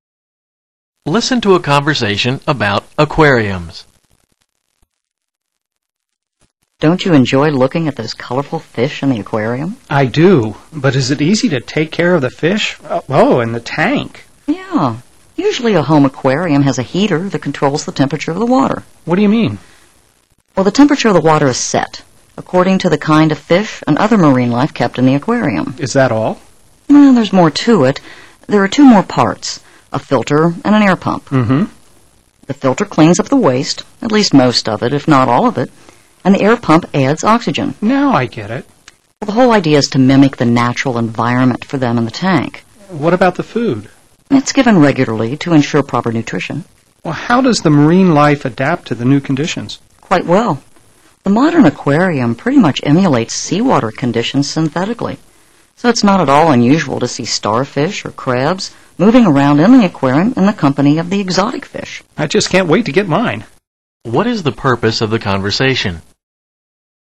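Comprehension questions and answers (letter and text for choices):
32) What is the purpose of the conversation?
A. An introduction to a synthetic product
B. The major components of an aquarium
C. The requirements for waste removal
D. The water temperature gauge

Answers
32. B. The major components of an aquarium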